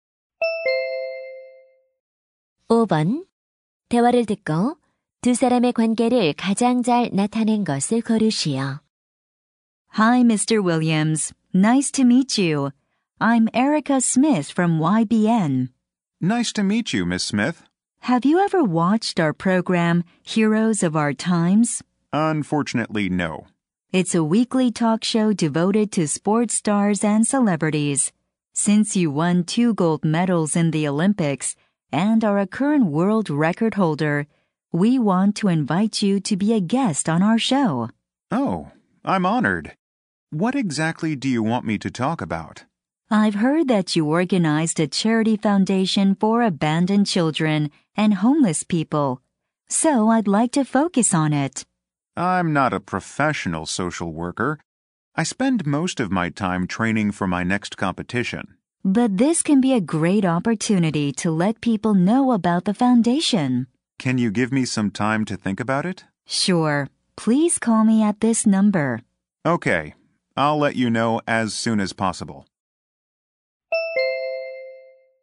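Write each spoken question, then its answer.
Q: 대화를 듣고 두 사람의 관계를 가장 잘 나타낸 것을 고르시오.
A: 방송 관계자(토크쇼 섭외 담당) - 운동선수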